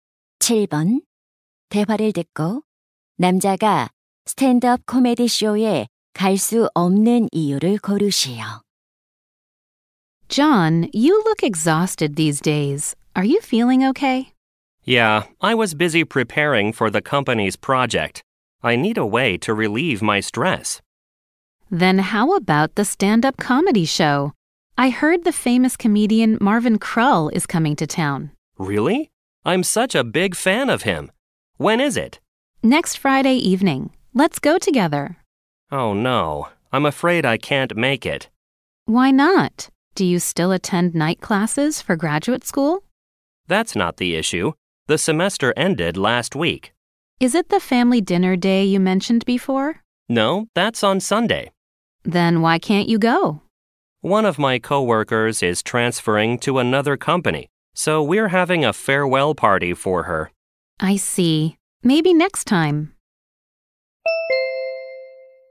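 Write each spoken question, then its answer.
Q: 대화를 듣고 남자가 스탠드업 코미디 쇼에 갈 수 없는 이유를 고르시오.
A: 전근 가는 동료의 송별회에 참석해야 해서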